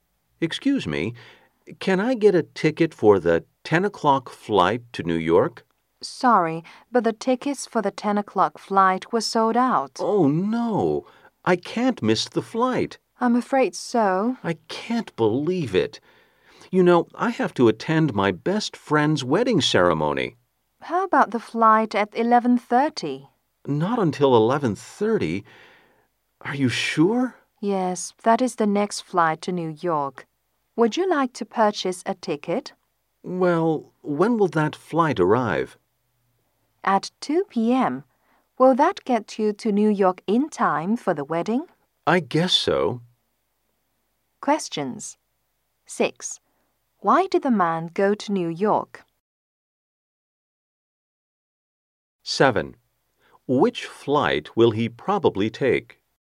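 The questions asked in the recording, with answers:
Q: Why did the man go to New York?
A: To attend his best friend's wedding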